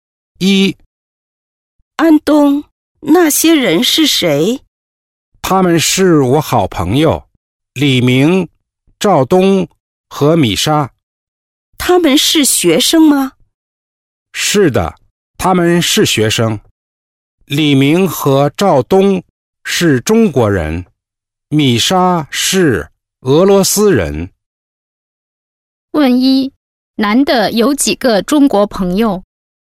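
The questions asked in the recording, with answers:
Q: 男的有几个中国朋友?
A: 两个(李明和赵东)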